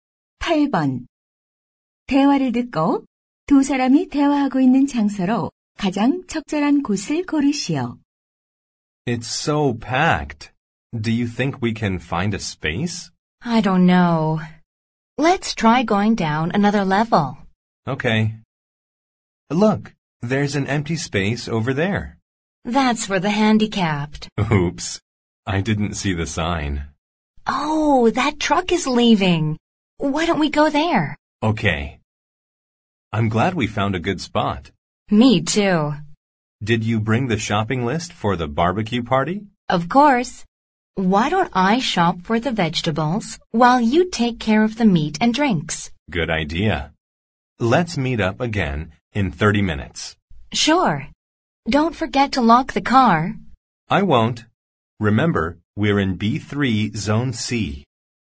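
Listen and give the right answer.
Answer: 주차장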